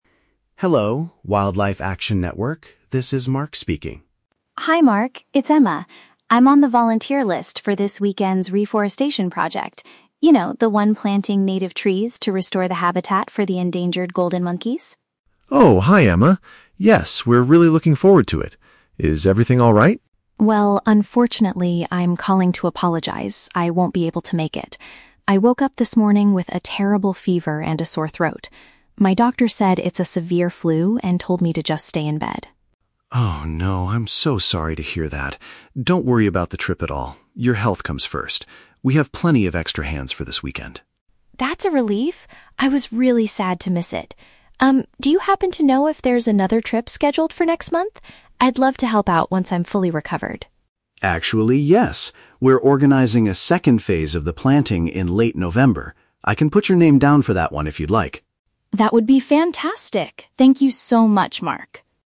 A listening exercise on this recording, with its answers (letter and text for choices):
Listen to a telephone conversation between a student and a program coordinator. Choose the best answer (A, B, or C) for each question.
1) Why is Emma calling the coordinator?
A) To ask if he can recommend a doctor for her severe flu.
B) To inform him that she must miss the activity because she is unwell.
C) To donate money to the organization that protects endangered monkeys.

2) What is the main purpose of the weekend project?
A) To provide medical treatment for sick monkeys in the forest.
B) To rescue wild monkeys that have been illegally sold as pets.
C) To grow trees in order to rebuild the living area of a rare species.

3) What do the two speakers agree to do at the end of the phone call?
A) Mark will spend the weekend finding another volunteer to replace Emma.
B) Emma will be registered for the next environmental trip in November.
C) Mark will send Emma some photos of the newly planted trees.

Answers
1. B) To inform him that she must miss the activity because she is unwell.
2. C) To grow trees in order to rebuild the living area of a rare species.
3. B) Emma will be registered for the next environmental trip in November.

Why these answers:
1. Emma says she "won't be able to make it" because she has a "terrible fever" and the "flu". Option B paraphrases this as having to "miss the activity because she is unwell." Why the trap is wrong: Option (A) is a trap. The words "doctor" and "flu" are mentioned in the audio, but Emma does not ask Mark to recommend a doctor; she has already seen her own doctor. Option (C) is a plausible action for a charity, but it is never mentioned.
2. Emma describes the project as "planting native trees to restore the habitat for the endangered golden monkeys." Option C uses synonyms: "grow trees" (planting trees), "rebuild the living area" (restore habitat), and "rare species" (endangered monkeys). Why the trap is wrong: Option (A) is a trap. The audio mentions the word "sick" (Emma's flu) and "monkeys", but the project is about planting trees, not giving medical treatment to the animals. Option (B) is not mentioned in the conversation.
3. Emma asks if there is a trip "next month," and Mark says he can "put your name down" for the planting phase in "late November." Option B paraphrases this perfectly as being "registered for the next environmental trip in November." Why the trap is wrong: Option (A) is a trap. Mark mentions that they have "plenty of extra hands for this weekend," which means they already have enough people; he does not need to spend the weekend finding a replacement. Option (C) is a nice thought but is never mentioned.

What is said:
Coordinator: Hello, Wildlife Action Network, this is Mark speaking.
Emma: Hi Mark, it's Emma. I'm on the volunteer list for this weekend's reforestation project... you know, the one planting native trees to restore the habitat for the endangered golden monkeys.
Coordinator: Oh, hi Emma. Yes, we're really looking forward to it. Is everything alright?
Emma: Well, unfortunately, I'm calling to apologize. I won't be able to make it. I woke up this morning with a terrible fever and a sore throat. My doctor said it's a severe flu and told me to just stay in bed.
Coordinator: Oh no, I'm so sorry to hear that. Don't worry about the trip at all; your health comes first. We have plenty of extra hands for this weekend.
Emma: That's a relief. I was really sad to miss it. Um, do you happen to know if there's another trip scheduled for next month? I'd love to help out once I'm fully recovered.
Coordinator: Actually, yes. We're organizing a second phase of the planting in late November. I can put your name down for that one if you'd like.